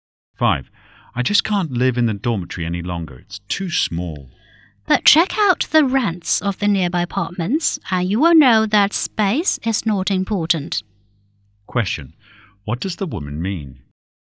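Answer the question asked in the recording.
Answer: Nearby apartments are too expensive, so the man should stay in the dormitory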